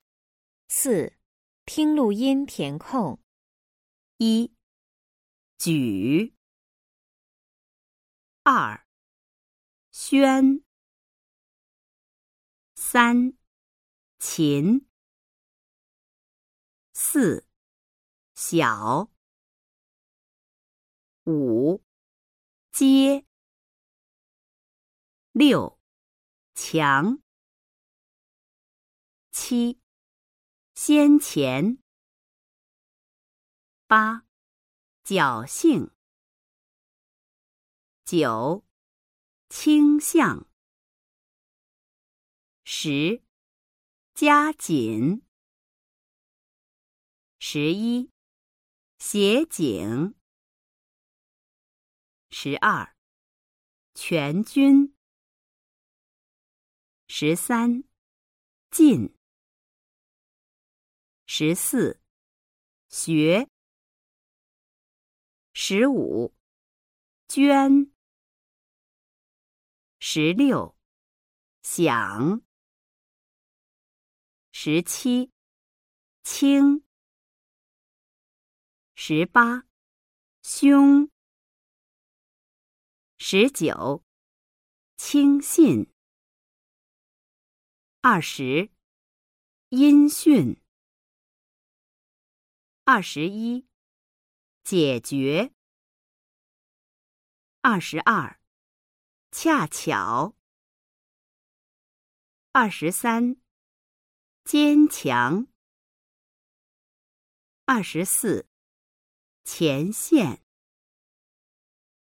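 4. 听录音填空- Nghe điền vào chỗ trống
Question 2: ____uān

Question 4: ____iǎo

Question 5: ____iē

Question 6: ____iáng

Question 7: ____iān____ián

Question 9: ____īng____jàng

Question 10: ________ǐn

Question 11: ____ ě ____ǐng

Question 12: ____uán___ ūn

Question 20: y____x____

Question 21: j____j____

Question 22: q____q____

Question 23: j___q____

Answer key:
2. x
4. x
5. j
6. q
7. x; q
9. q; x
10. jiāj
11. xi; j
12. q; j
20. īn; ùn
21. iě; ué
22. ià; iǎo
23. iān; iáng

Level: Sơ Cấp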